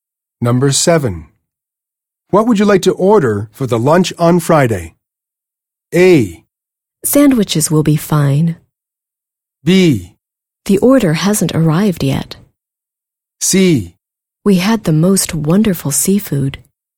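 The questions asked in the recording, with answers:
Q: What would you like to order for the lunch on Friday?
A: A: Sandwiches will be fine.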